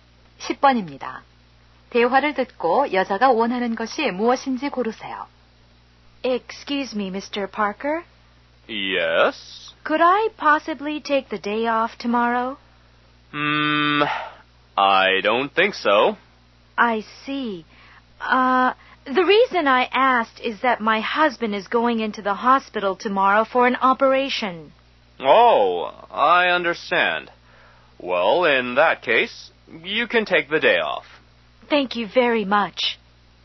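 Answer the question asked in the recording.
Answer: 내일 하루 휴가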